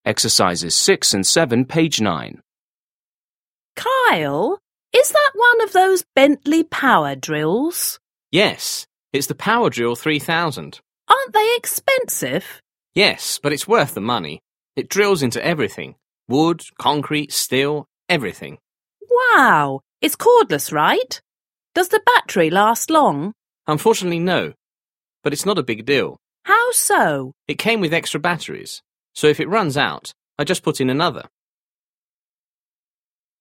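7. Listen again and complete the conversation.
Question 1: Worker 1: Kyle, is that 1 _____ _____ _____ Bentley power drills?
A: one of those

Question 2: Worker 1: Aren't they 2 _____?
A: expensive

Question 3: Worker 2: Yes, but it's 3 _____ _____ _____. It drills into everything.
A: worth the money

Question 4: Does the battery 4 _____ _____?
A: last long

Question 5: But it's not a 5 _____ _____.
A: big deal

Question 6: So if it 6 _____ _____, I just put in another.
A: runs out

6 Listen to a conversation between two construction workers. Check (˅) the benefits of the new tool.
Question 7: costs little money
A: not checked

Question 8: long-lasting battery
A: not checked

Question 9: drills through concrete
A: checked

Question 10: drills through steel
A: checked

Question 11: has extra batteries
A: checked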